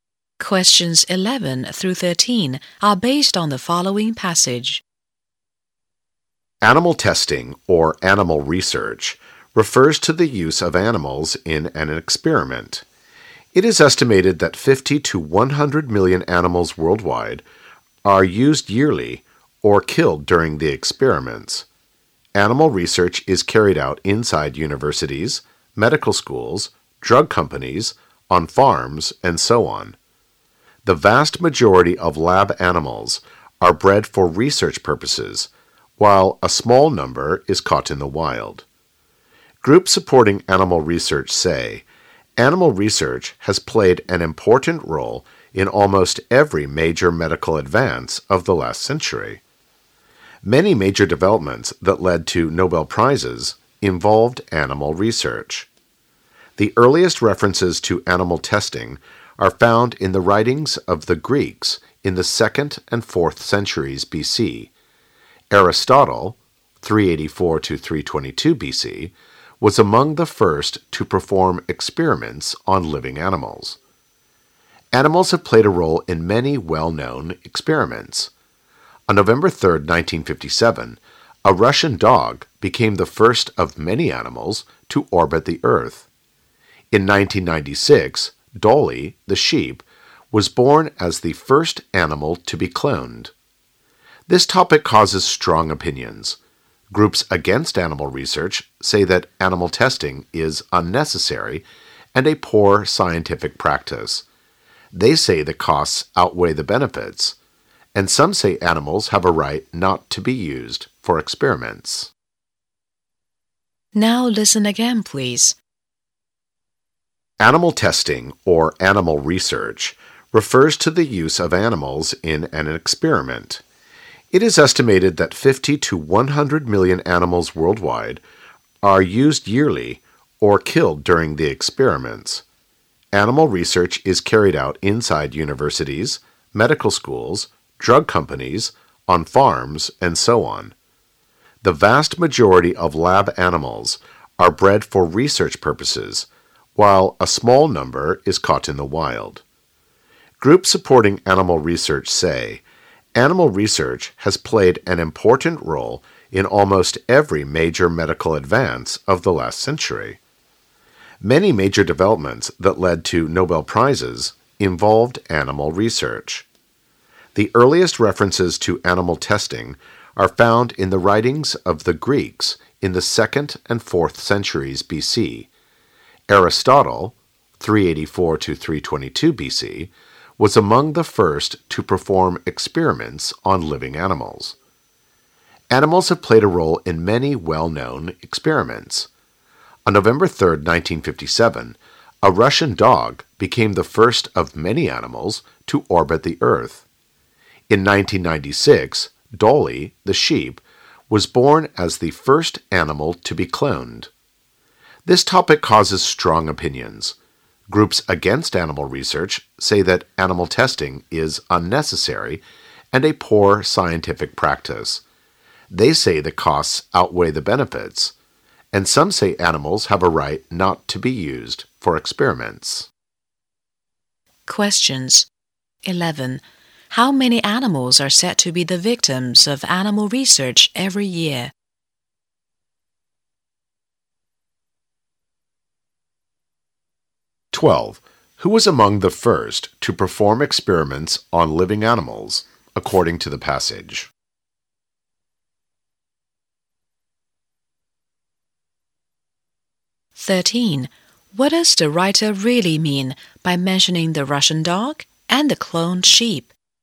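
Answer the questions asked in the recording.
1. 50 to 100 million
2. Aristotle
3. Animals have played a role in many well-known experiments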